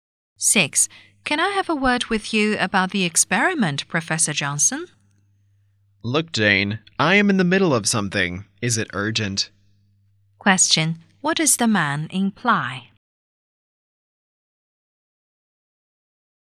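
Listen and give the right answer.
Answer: He is busy right now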